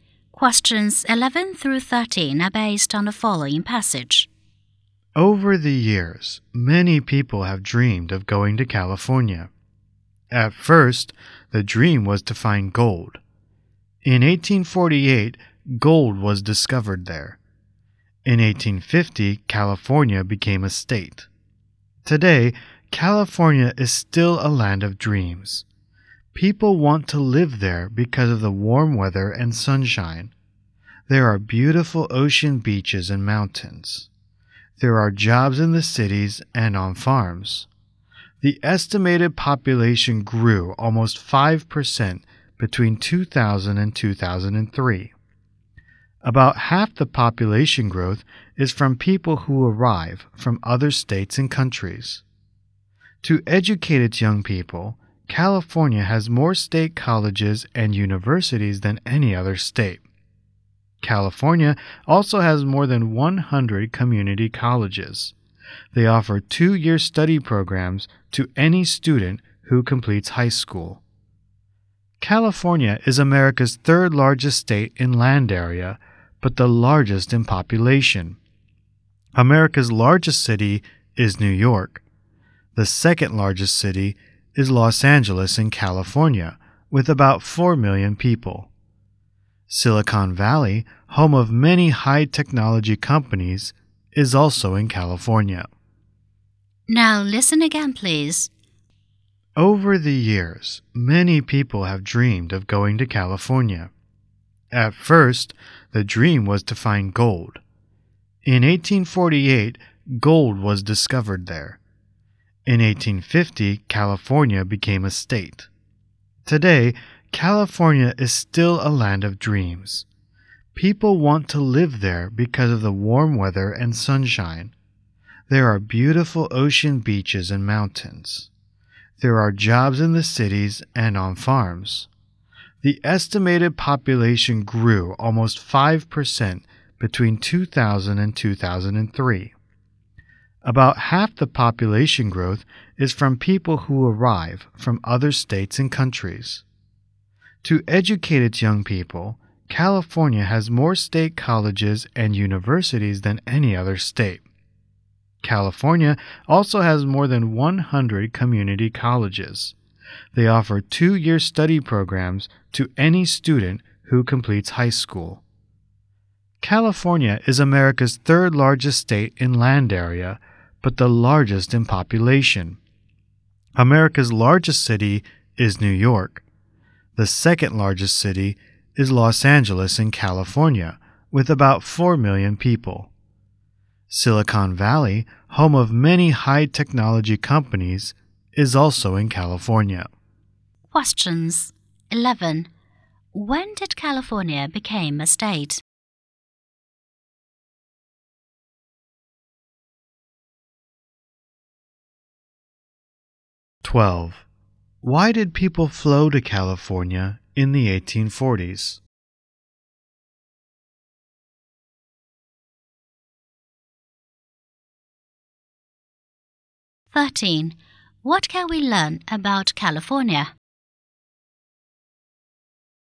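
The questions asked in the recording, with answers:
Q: When did California become a state?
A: In 1850

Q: Why did people flow to California in the 1840s?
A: To find gold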